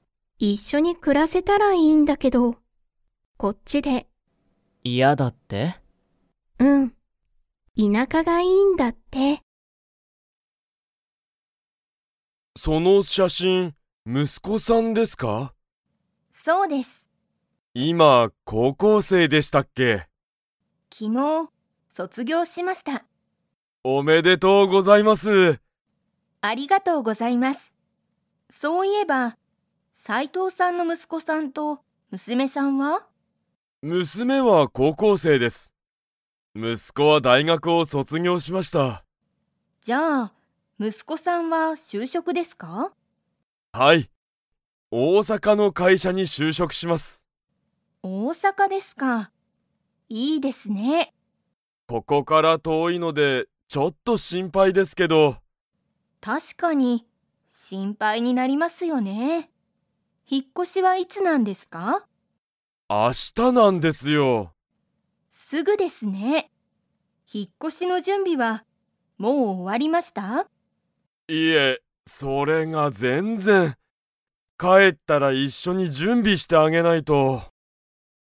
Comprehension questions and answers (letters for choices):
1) 松井まついさんの息子むすこは、いつ高校こうこうを卒業そつぎょうしましたか?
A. 昨日きのう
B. 今日きょう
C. 去年きょねん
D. 一週間いっしゅうかん前まえ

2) 斉藤さいとうさんの息子むすこは、引ひっ越こしの準備じゅんびが 。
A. 終おわった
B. 終おわっていない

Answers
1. A
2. B

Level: Level 4